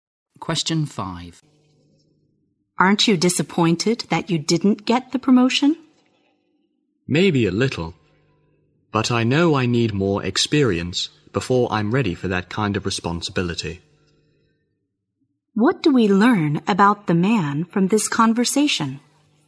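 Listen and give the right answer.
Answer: He thinks he needs more experience before a promotion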